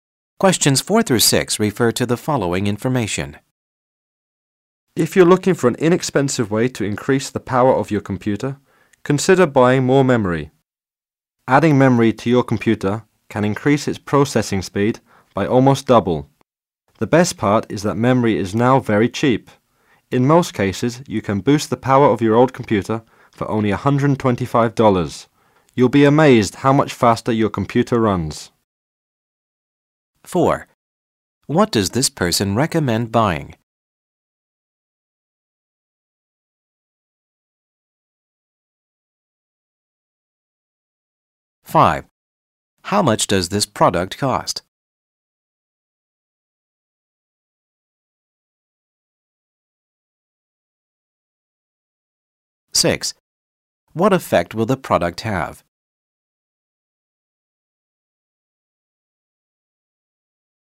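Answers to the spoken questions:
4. More computer memory
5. $125
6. The computer will run much faster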